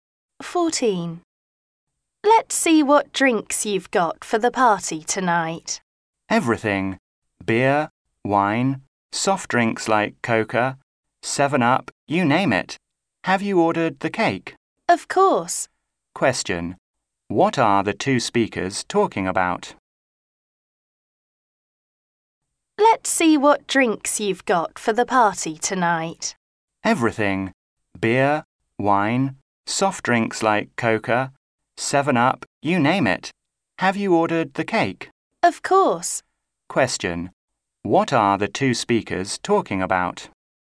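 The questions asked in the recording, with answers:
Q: What are the two speakers talking about?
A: Preparations for a party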